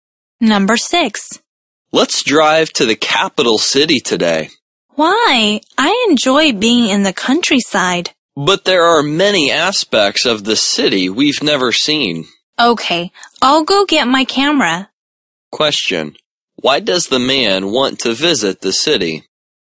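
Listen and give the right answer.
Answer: To see aspects of the city they've never seen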